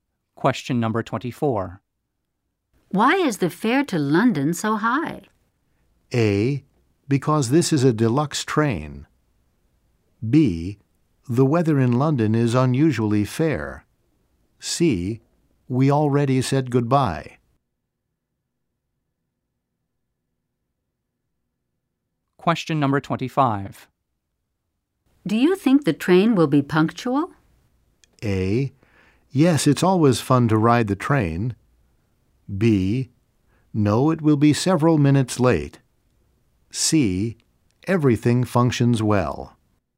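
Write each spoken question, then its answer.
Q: Why is the fare to London so high?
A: A: Because this is a deluxe train.

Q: Do you think the train will be punctual?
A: B: No, it will be several minutes late.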